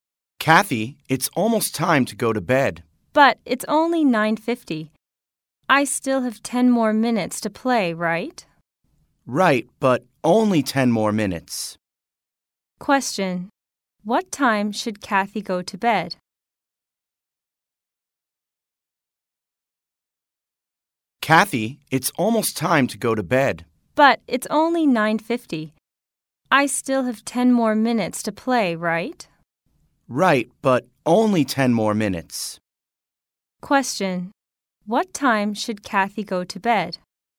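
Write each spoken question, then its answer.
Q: What time should Kathy go to bed?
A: At 10:00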